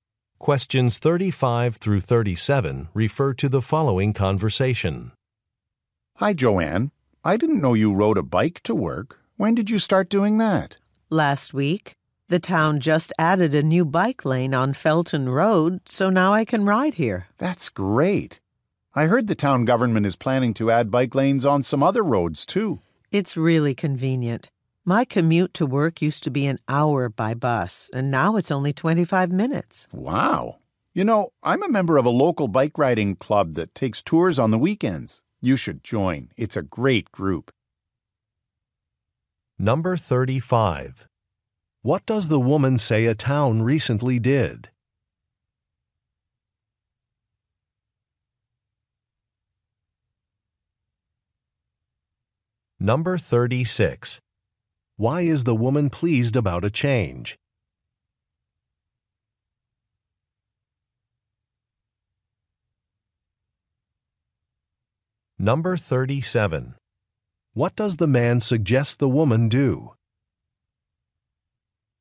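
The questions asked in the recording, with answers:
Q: What does the woman say a town recently did?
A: Added a new bike lane on Felton Road

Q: Why is the woman pleased about a change?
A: Her commute is shorter (25 minutes instead of an hour)

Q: What does the man suggest the woman do?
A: Join a local bike riding club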